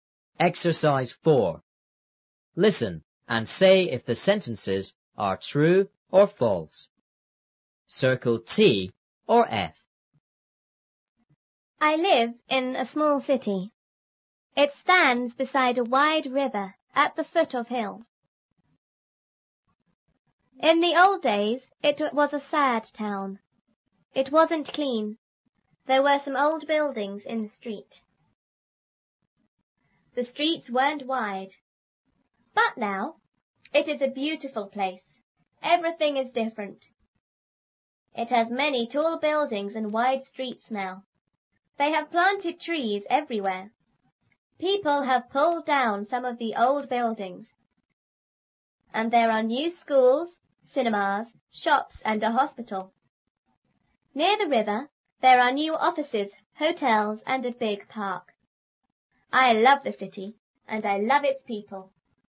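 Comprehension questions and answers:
4.Listen and say if the sentences are True or False.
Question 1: My city is far away from a river.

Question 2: In the old days,the streets weren't wide.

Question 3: Everything is the same in my city.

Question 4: People have pulled down all the schools in the city.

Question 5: The big park is beside the river.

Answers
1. F
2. T
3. F
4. F
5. T

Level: 初中英语广州版3B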